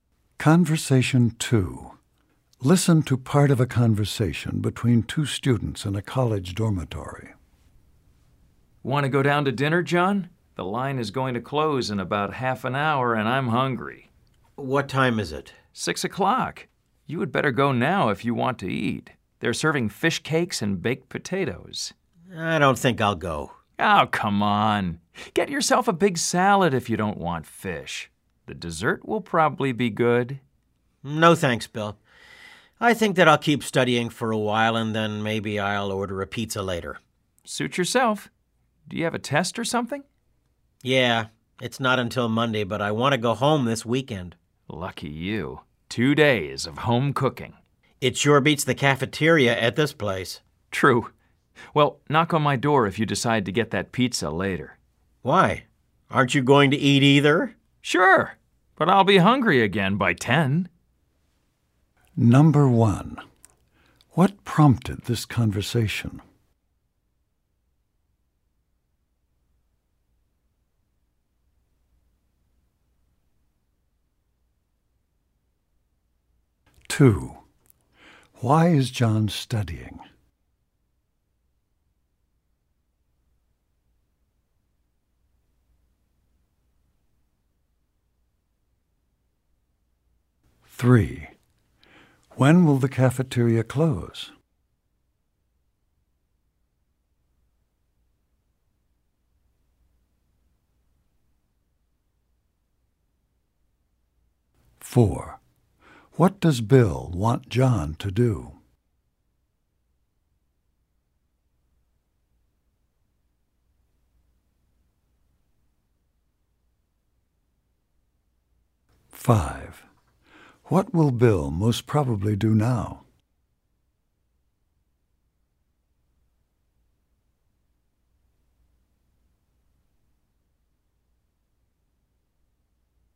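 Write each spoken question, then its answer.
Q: What prompted this conversation?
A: Bill wanted John to go to dinner

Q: Why is John studying?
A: He has a test Monday and wants to go home this weekend

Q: When will the cafeteria close?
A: At 6:30

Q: What will Bill most probably do now?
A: Go to dinner in the cafeteria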